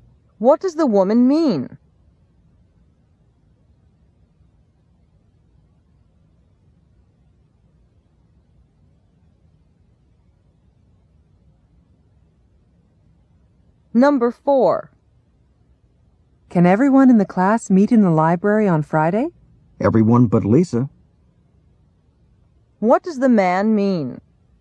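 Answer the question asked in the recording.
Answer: Everyone except Lisa can meet in the library on Friday.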